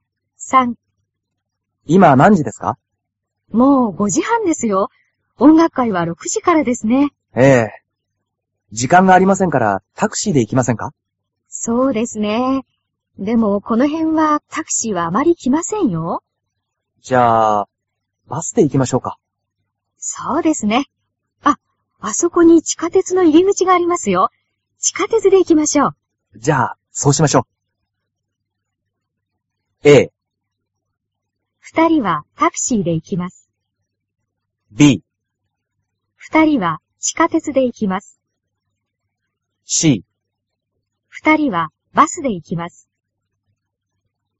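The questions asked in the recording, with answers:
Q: 二人はバスで行きます。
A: B: 二人は地下鉄で行きます。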